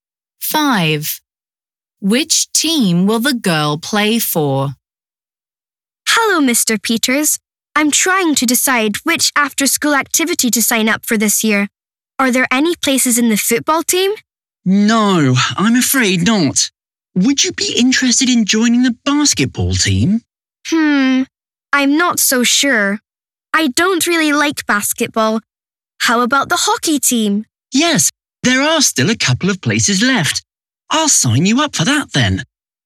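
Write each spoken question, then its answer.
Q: Which team will the girl play for?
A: the hockey team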